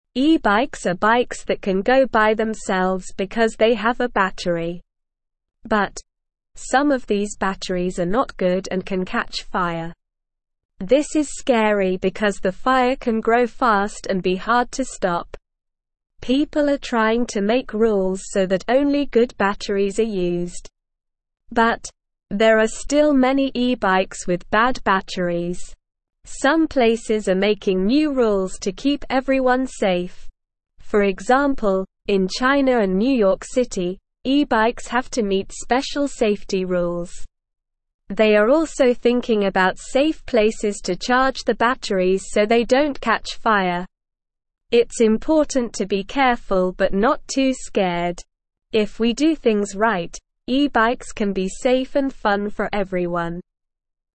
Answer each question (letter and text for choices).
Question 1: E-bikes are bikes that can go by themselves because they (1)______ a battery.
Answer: have

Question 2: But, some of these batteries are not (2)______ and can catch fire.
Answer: good

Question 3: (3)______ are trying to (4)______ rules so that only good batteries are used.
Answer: People

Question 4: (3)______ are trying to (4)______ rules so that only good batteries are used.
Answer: make

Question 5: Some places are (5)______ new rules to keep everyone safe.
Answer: making

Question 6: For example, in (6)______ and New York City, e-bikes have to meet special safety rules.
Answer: China

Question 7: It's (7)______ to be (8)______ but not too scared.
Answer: important

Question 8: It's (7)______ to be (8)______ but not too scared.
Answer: careful

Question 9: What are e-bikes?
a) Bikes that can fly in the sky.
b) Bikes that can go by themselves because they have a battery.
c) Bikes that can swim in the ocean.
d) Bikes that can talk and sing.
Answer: b) Bikes that can go by themselves because they have a battery.

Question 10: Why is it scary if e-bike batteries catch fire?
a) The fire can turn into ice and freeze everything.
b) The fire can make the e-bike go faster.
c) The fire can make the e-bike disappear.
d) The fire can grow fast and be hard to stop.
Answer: d) The fire can grow fast and be hard to stop.

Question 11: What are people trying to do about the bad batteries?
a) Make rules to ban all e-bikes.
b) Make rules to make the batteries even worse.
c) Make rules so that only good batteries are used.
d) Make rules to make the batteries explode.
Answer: c) Make rules so that only good batteries are used.

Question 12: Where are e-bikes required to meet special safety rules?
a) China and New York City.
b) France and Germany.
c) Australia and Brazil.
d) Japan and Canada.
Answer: a) China and New York City.

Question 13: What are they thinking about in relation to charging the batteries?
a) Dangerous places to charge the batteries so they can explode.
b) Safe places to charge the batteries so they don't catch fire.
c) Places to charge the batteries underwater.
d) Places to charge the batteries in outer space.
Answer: b) Safe places to charge the batteries so they don't catch fire.

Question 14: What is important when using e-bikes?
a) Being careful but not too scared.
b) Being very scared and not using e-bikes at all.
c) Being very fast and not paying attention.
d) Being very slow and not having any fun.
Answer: a) Being careful but not too scared.

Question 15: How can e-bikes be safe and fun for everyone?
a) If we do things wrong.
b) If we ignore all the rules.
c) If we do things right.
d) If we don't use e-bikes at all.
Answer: c) If we do things right.

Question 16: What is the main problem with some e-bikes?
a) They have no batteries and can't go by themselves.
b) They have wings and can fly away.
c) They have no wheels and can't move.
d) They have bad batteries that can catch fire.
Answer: d) They have bad batteries that can catch fire.

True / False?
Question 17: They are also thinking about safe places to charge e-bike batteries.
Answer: True

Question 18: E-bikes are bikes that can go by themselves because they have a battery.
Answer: True

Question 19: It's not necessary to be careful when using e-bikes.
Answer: False

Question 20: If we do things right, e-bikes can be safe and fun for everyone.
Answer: True

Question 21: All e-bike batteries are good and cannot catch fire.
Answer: False

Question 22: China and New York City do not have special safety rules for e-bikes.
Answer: False

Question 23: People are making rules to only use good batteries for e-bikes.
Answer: True

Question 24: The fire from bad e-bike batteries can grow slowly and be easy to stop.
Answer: False

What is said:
But, some of these batteries are not good and can catch fire. This is scary because the fire can grow fast and be hard to stop. People are trying to make rules so that only good batteries are used. But, there are still many e-bikes with bad batteries.
Some places are making new rules to keep everyone safe. For example, in China and New York City, e-bikes have to meet special safety rules. They are also thinking about safe places to charge the batteries so they don't catch fire. It's important to be careful but not too scared.

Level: Level 1